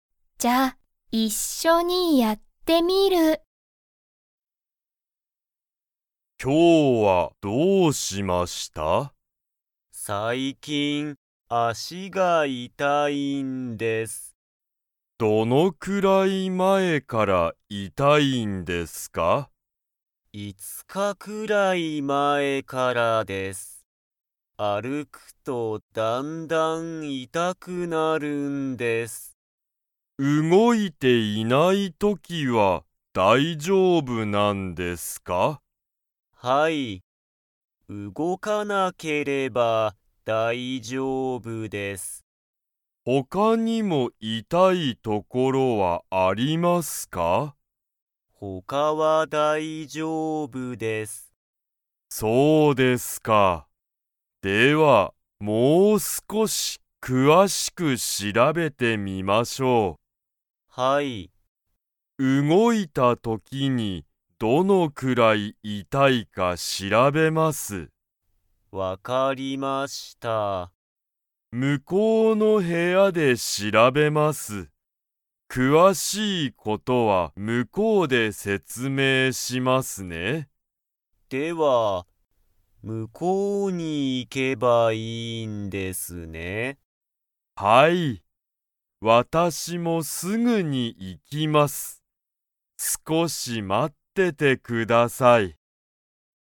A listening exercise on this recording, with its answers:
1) 鈴木すずきさんは、どのくらい前まえから足あしが痛いたいですか?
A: 5日いつかくらい前まえ

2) 先生せんせいは、足あしをもう少すこし詳くわしく調しらべますか?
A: はい

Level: Level 3